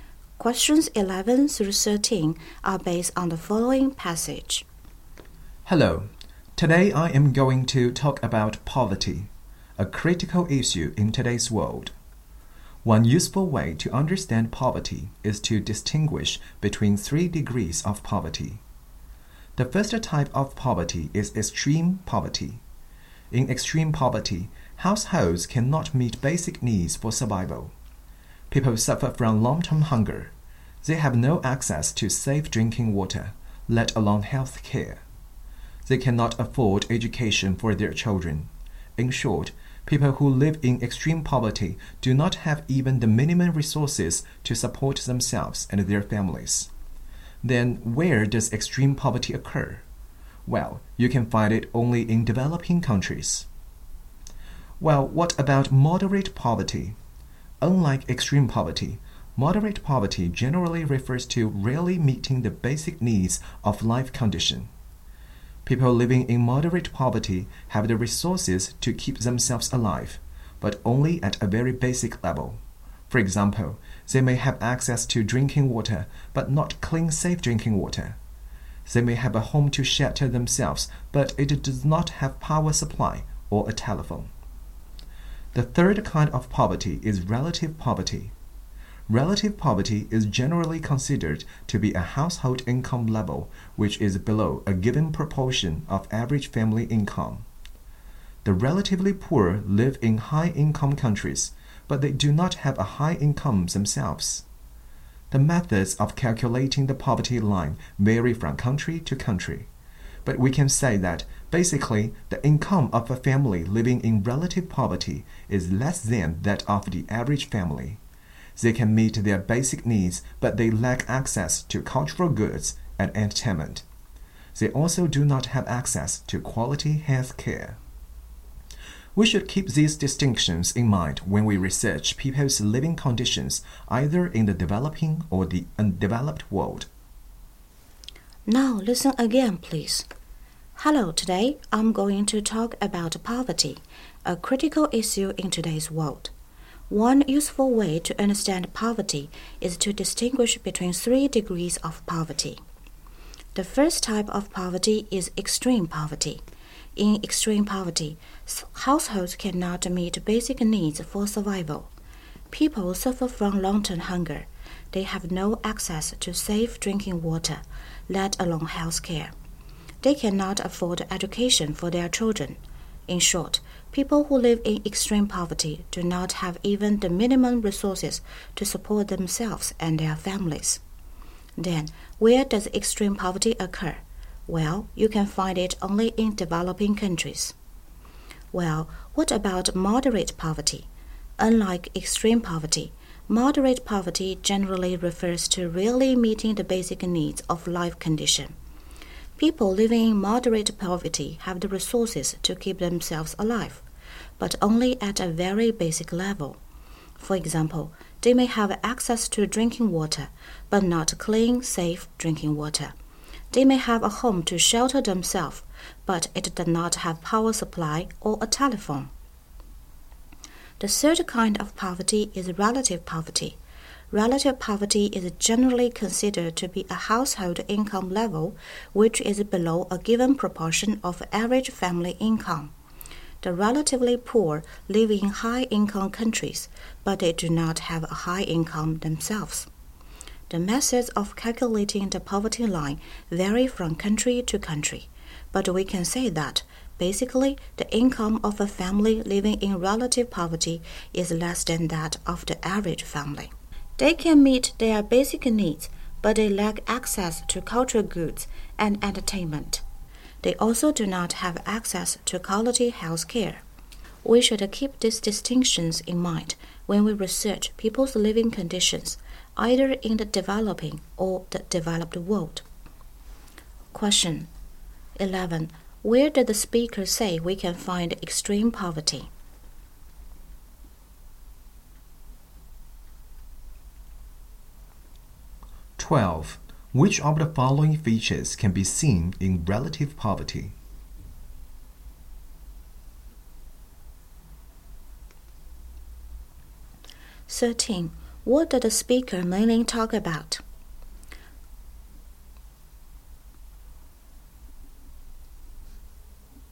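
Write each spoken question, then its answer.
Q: Where did the speaker say we can find extreme poverty?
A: Only in developing countries

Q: Which of the following features can be seen in relative poverty?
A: Lack of access to cultural goods, entertainment and quality health care

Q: What did the speaker mainly talk about?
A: Three degrees of poverty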